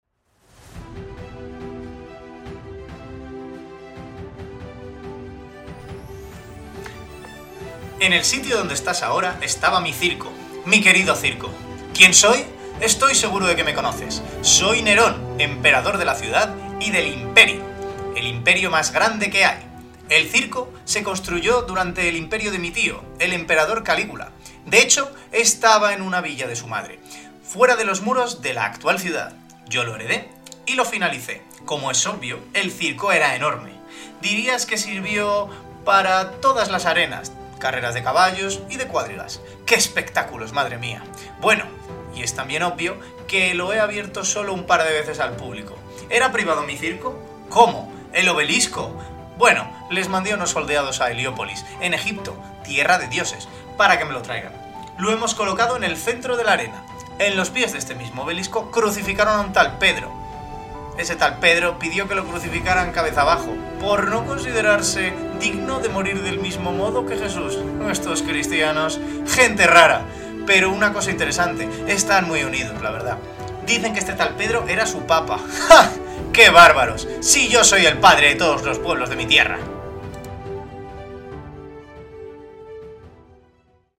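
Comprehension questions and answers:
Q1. Al lado de este objeto ejecutaron a San Pedro:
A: el obelisco

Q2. ¿Cómo fue martirizado San Pedro?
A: Crucificado cabeza abajo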